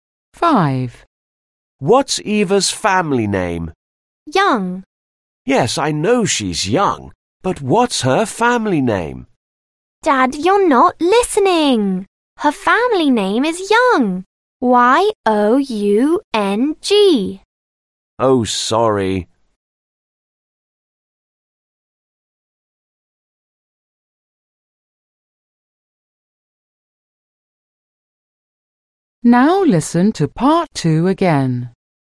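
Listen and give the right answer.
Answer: Young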